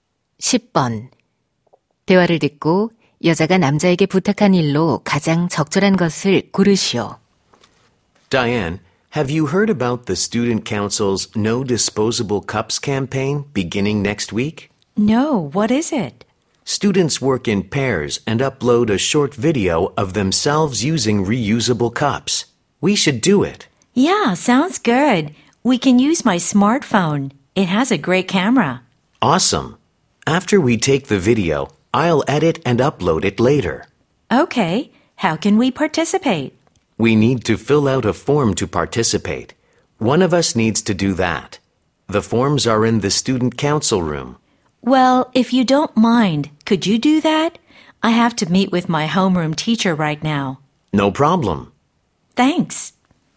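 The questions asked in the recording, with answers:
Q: 대화를 듣고 여자가 남자에게 부탁한 일로 가장 적절한 것을 고르시오.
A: 캠페인 참가 신청서 작성하기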